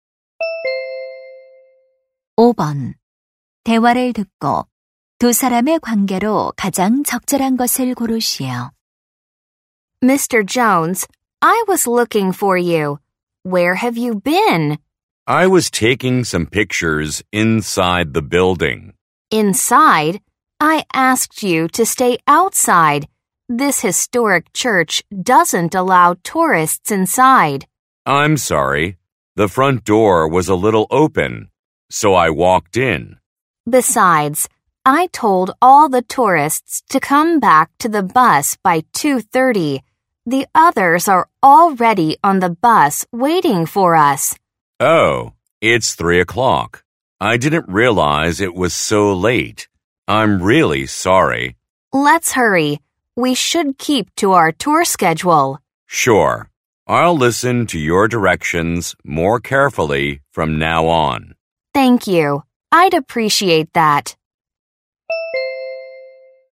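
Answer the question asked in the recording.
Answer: 관광 가이드 - 관광객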